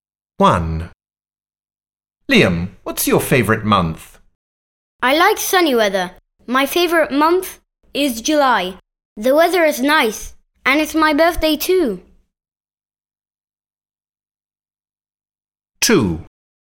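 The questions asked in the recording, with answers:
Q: Liam, what's your favourite month?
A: July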